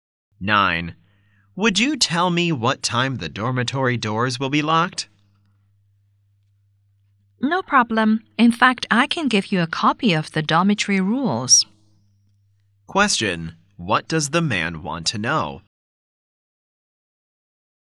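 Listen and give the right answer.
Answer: What time the dormitory doors will be locked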